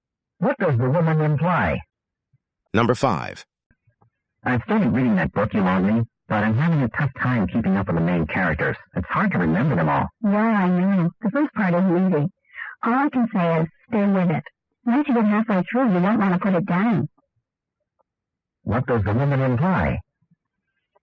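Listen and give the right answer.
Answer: The book gets much better later, so he should keep reading.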